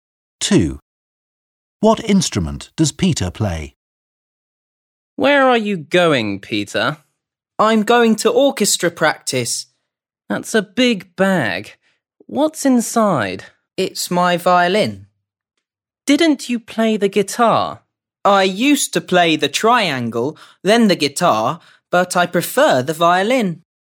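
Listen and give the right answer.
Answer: the violin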